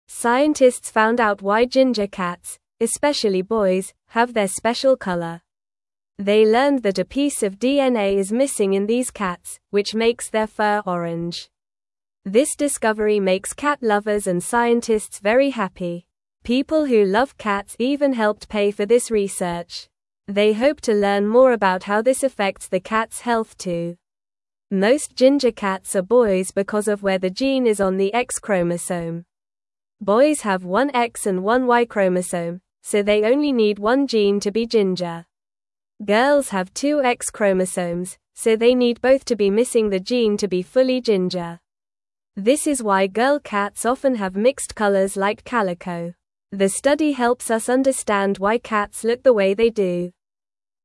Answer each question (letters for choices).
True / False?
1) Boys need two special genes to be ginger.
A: False

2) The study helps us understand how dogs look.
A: False

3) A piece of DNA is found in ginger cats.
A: False

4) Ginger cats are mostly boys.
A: True

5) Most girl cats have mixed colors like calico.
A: True

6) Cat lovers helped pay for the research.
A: True

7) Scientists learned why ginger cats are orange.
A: True

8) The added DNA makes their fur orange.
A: False

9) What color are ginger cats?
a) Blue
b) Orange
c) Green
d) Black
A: b

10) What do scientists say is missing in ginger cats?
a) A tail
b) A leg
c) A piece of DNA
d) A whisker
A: c

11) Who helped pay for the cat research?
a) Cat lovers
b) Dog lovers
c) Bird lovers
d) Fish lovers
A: a

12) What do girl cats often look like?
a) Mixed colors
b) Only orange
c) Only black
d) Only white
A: a

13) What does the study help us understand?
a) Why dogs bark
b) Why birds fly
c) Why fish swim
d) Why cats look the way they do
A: d

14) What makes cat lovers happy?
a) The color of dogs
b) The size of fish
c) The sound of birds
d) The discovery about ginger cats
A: d

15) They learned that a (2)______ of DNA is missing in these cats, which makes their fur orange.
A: piece

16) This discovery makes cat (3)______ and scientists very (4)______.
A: lovers

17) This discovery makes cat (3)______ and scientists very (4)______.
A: happy

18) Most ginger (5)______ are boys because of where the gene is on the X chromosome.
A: cats

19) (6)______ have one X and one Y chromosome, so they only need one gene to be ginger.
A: Boys

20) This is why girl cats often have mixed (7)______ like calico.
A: colors

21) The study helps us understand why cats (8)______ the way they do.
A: look

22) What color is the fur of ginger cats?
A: Ginger cats have orange fur.

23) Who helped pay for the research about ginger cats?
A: Cat lovers helped pay for the research.

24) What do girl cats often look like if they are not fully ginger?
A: Girl cats often look like they have mixed colors, like calico.

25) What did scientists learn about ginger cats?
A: Scientists learned that a piece of DNA is missing in ginger cats.

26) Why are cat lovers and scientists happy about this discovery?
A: They are happy because it helps them understand why cats look the way they do.

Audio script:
Scientists found out why ginger cats, especially boys, have their special color. They learned that a piece of DNA is missing in these cats, which makes their fur orange. This discovery makes cat lovers and scientists very happy. People who love cats even helped pay for this research. They hope to learn more about how this affects the cats' health too.
Most ginger cats are boys because of where the gene is on the X chromosome. Boys have one X and one Y chromosome, so they only need one gene to be ginger. Girls have two X chromosomes, so they need both to be missing the gene to be fully ginger. This is why girl cats often have mixed colors like calico. The study helps us understand why cats look the way they do.

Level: Level 1